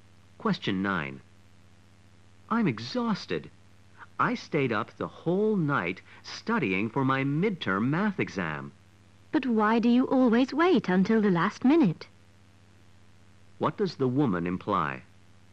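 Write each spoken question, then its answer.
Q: What does the woman imply?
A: The man always leaves his studying until the last minute.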